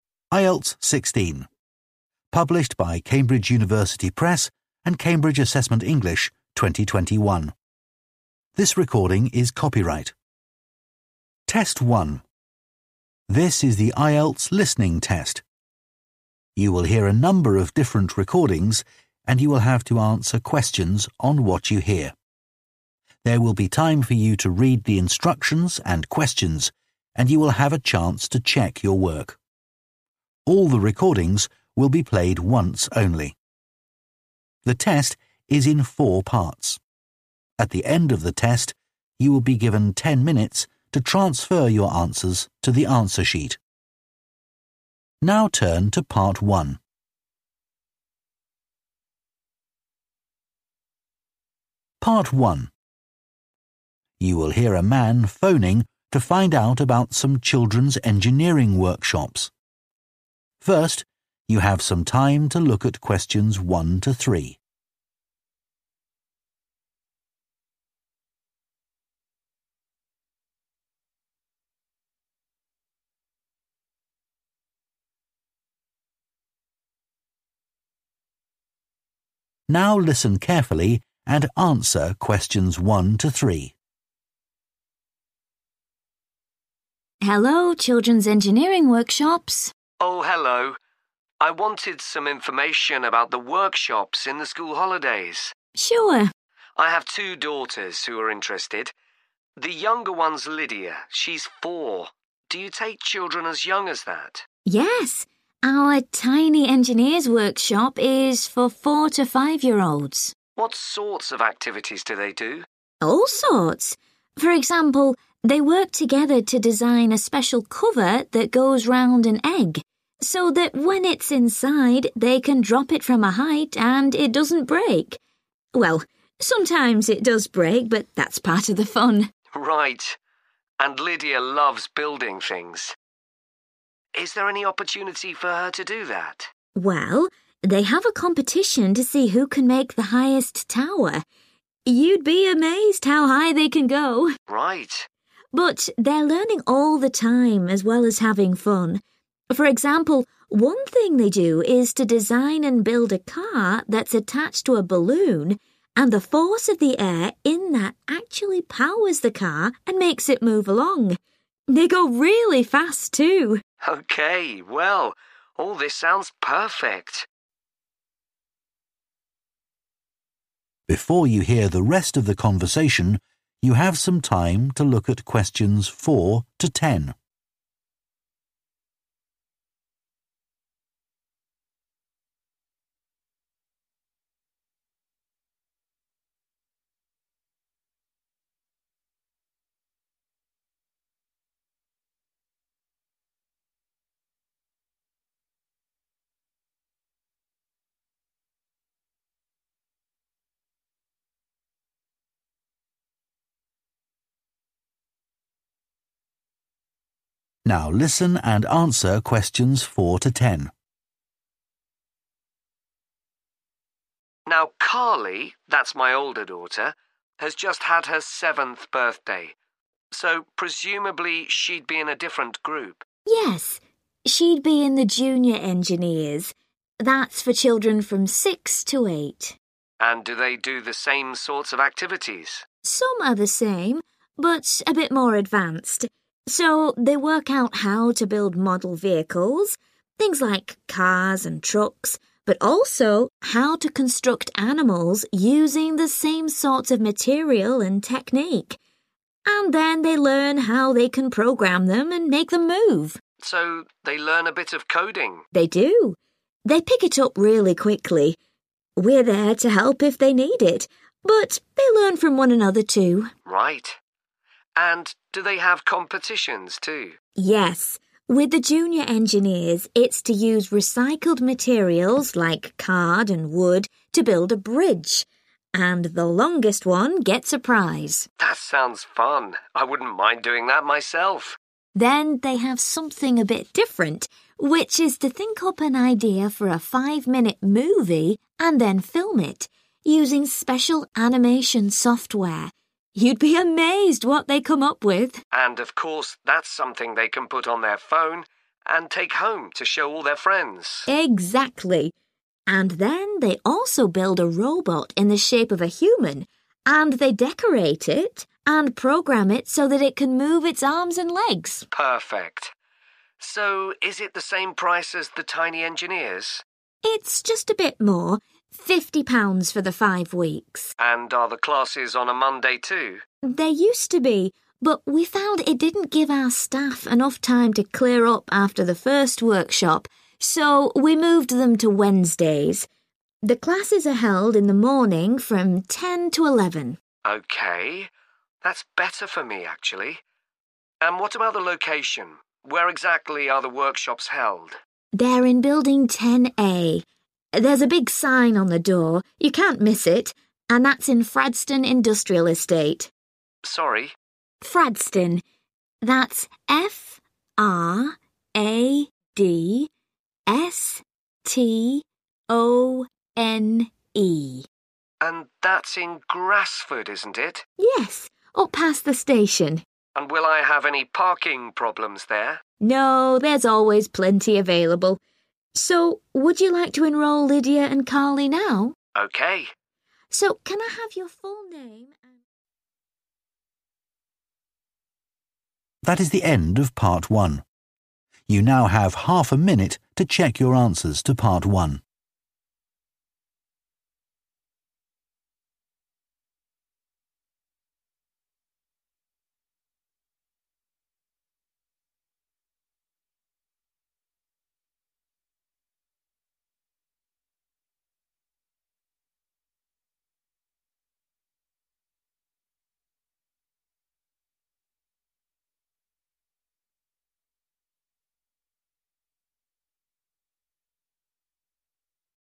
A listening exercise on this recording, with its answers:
Complete the notes below. Write ONE WORD AND/OR A NUMBER for each answer.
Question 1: Create a cover for an 1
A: egg

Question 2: Take part in a competition to build the tallest 2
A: tower

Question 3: Make a 3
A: car

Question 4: Build model cars, trucks, and 4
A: animals

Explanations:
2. họ có một cuộc thi để xem ai có thể làm được tháp cao nhất
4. họ tìm ra cách chế tạo các loại xe mô hình, những thứ như ô tô và xe tải, cũng như cách chế tạo động vật